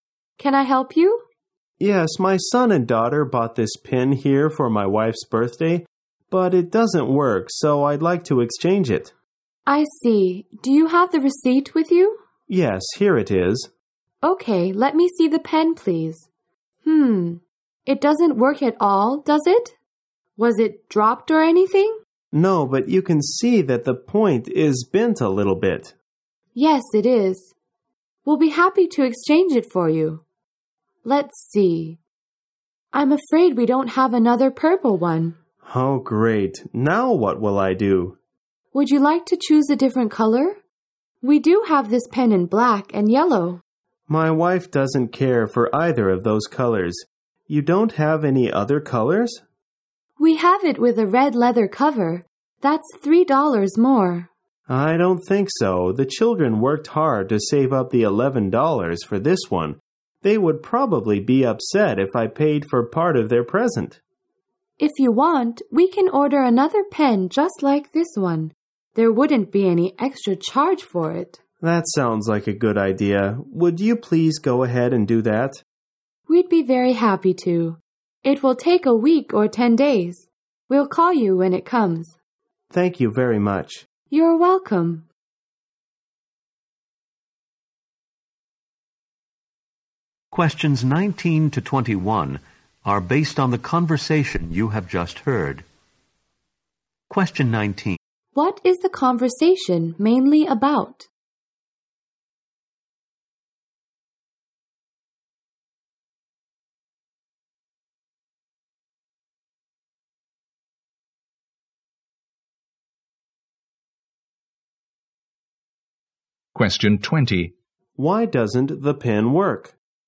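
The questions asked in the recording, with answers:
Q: What is the conversation mainly about?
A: Exchanging a broken pen

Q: Why doesn't the pen work?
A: Its point is bent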